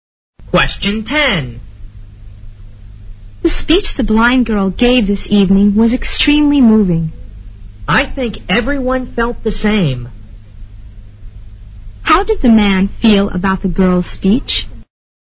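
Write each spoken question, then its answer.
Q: How did the man feel about the girl's speech?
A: He found it very moving too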